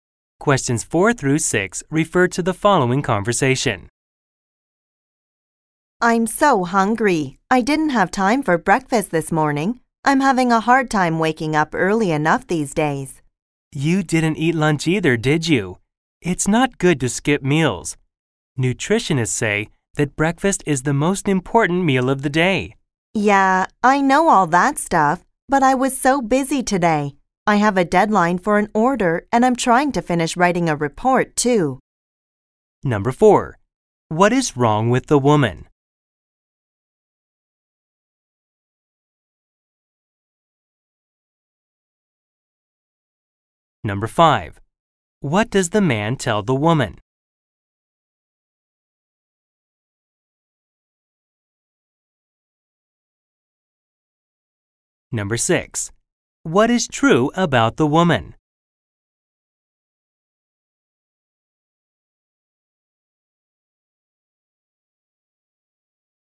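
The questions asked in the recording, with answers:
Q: What is wrong with the woman?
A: She is hungry because she skipped breakfast

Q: What does the man tell the woman?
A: It's not good to skip meals; breakfast is the most important meal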